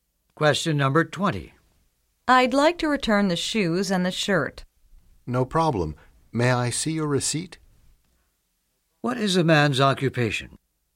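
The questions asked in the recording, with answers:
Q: What is the man's occupation?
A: Salesclerk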